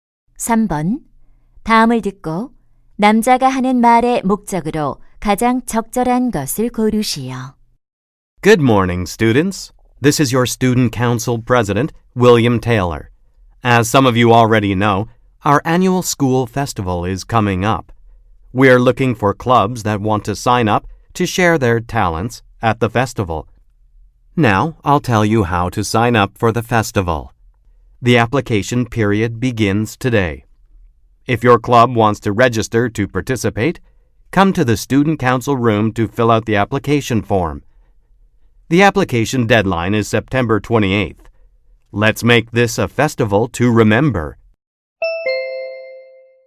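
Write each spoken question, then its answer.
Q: 다음을 듣고 남자가 하는 말의 목적으로 가장 적절한 것을 고르시오.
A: 학교 축제 참가 동아리 신청 방법을 안내하려고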